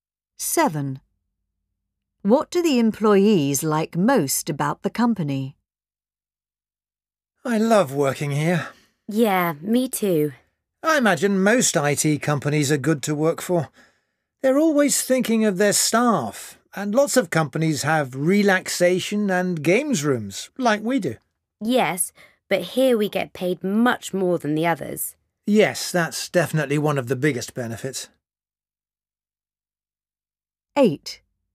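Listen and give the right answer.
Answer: They get paid more than at other companies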